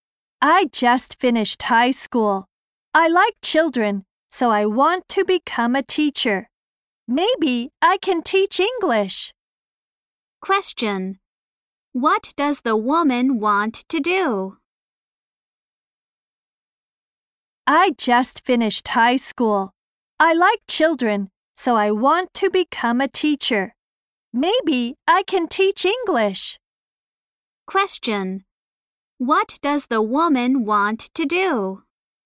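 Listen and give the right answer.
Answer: Become a teacher (maybe teach English)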